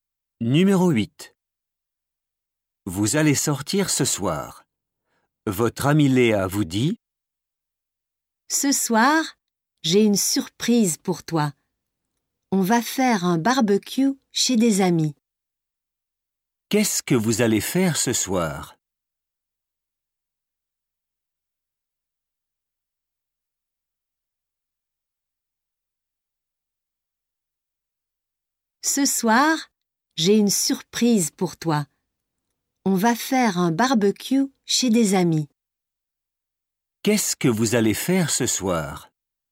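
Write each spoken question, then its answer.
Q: Qu'est-ce que vous allez faire ce soir?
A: Un barbecue chez des amis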